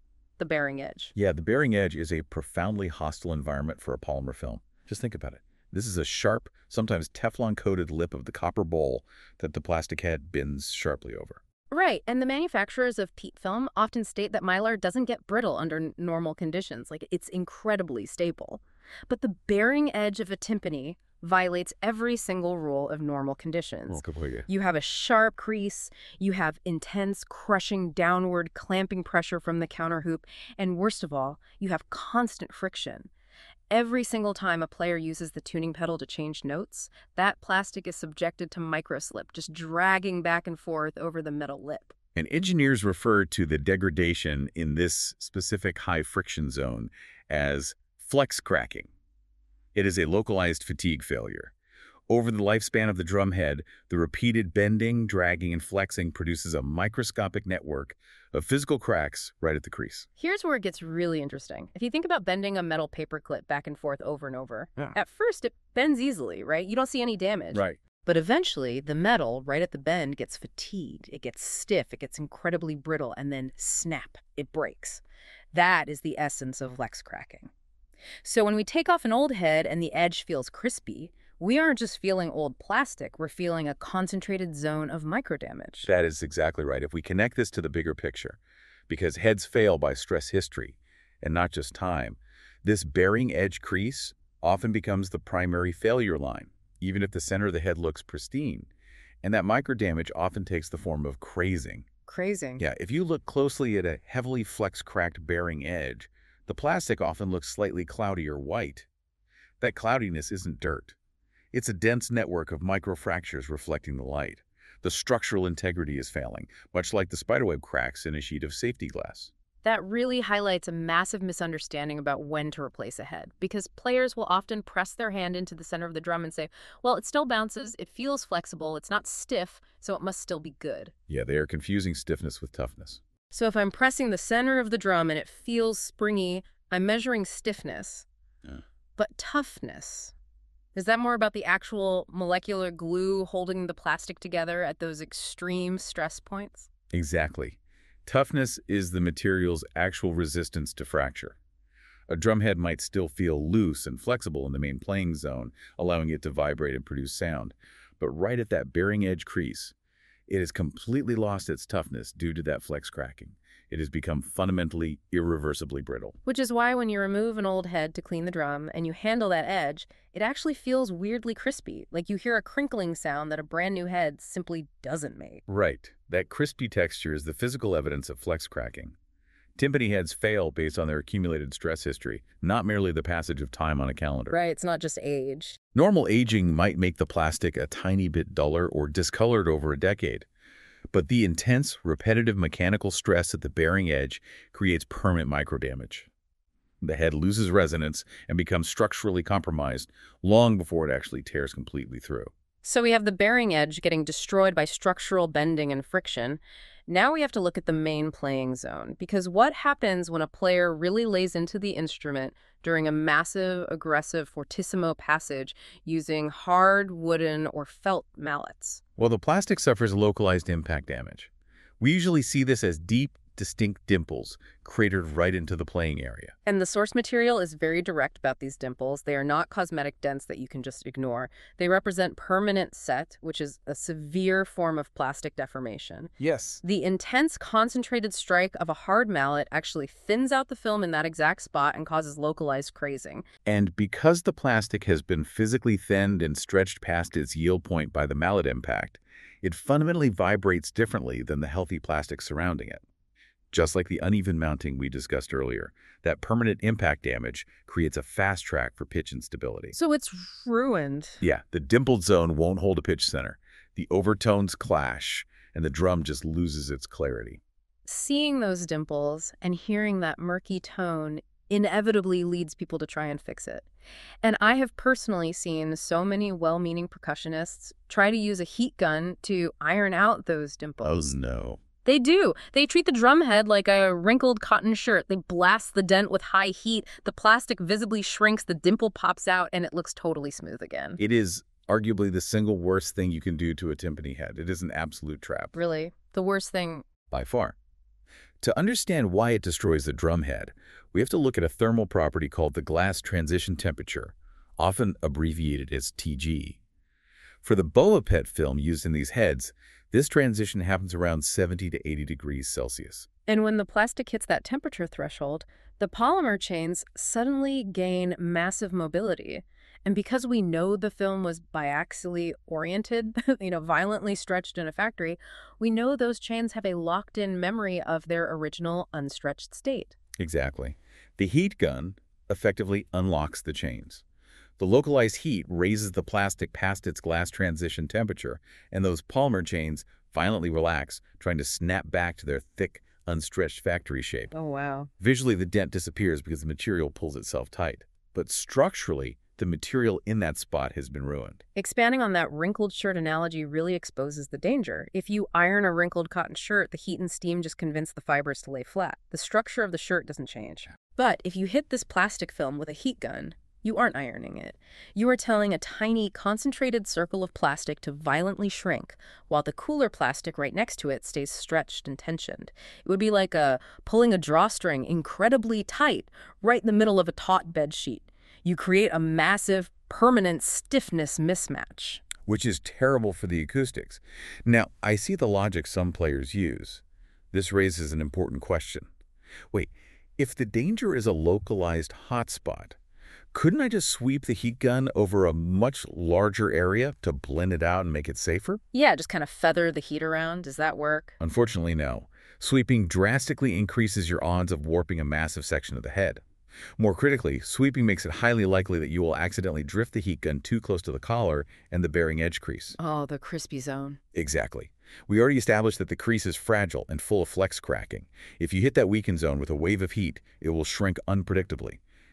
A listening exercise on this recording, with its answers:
Select a question to reveal the answer. Questions invite recall, analysis, application, or evaluation suitable for students and professionals.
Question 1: What is the typical range for the glass transition temperature (Tg) of PET film?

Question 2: What is the technical term for cracks produced by the repeated bending of a film?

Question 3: How does using a heat gun on a dimple affect the polymer chains of the PET film?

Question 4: How does "sweeping" a heat gun over a large area still pose a risk to the drumhead?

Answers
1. 70–80°C.
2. Flex cracking.
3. It increases chain mobility, allowing the orientation to relax.
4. It increases the likelihood of warping a large section or damaging the critical collar and bearing-edge crease.